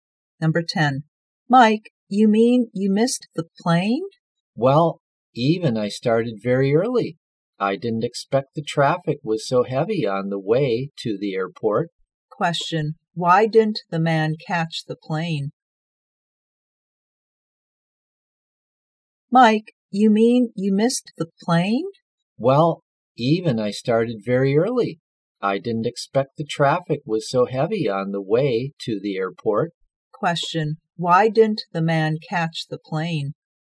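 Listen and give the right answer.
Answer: The traffic was heavy on the way to the airport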